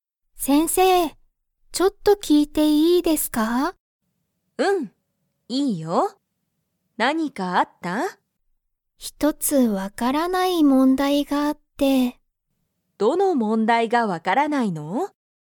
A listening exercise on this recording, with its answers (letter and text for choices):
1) リカは、____問題もんだいがある。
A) 分わかった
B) 分わからない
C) 見みたい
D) 見みない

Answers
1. B) 分わからない

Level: Level 1